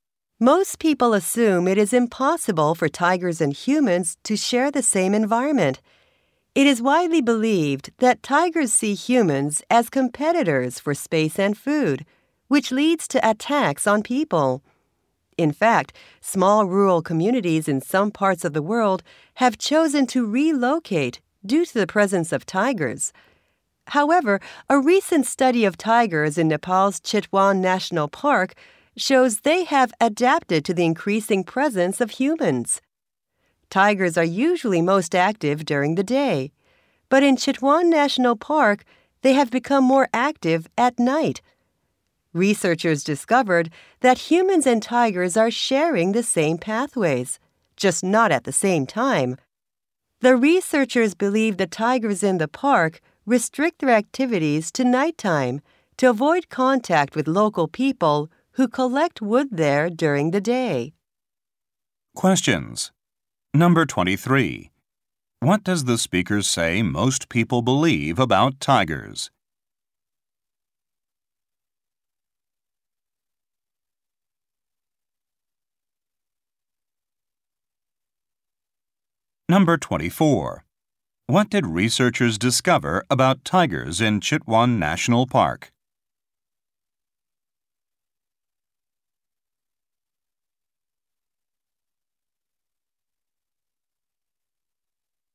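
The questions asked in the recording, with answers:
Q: What does the speaker say most people believe about tigers?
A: That tigers and humans cannot share the same environment; tigers see humans as competitors for space and food and attack them.

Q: What did researchers discover about tigers in Chitwan National Park?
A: They have become more active at night, using the same pathways as humans but at different times to avoid people.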